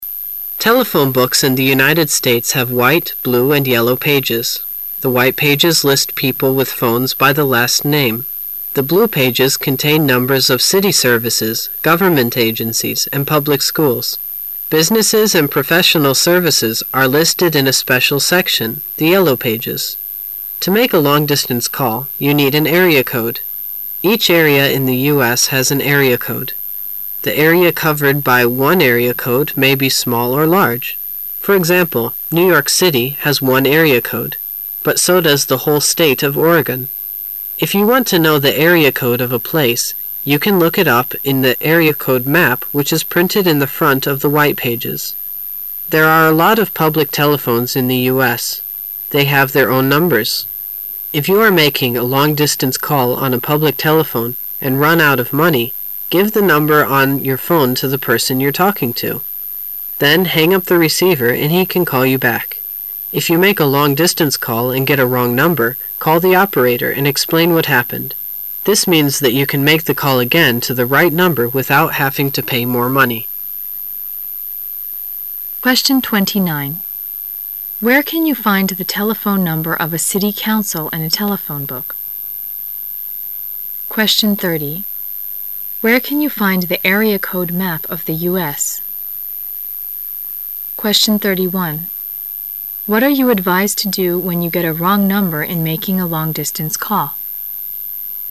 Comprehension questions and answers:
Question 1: Where can you find the area code map of the US?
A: In the front of the white pages.

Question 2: What are you advised to do when you get a wrong number in making a long distance call?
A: Tell the operator what has happened.

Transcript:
[解析] 29-31 Telephone books in the United States have white, blue and yellow pages. The white pages list people with phones by the last name. The blue pages contain numbers of city services, government agencies and public schools. Businesses and professional services pre listed in a special section, the yellow pages. To make a long distance call, you need an area code. Each area in the US has an area code. The area covered by One area code may be small or large. For example, New York City has one area code. But so docs tile whole State of Oregon. If you want to know the area code of a place, you can look it up in the area code map which is printed in the front of the white pages. There are a lot of publie telephones in the US. They have their own numbers. If you are making a long distance call on a public telephone and run out of money, give the number on your phone to the person you're talking to. Then hang up the receiver and he can call you back. If you make a long distance call and get a wrong number, call the operator and explain what happened. This means that you can make the call again to the right number without having to pay more money. Where can you find the telephone number of a city council in a telephone book?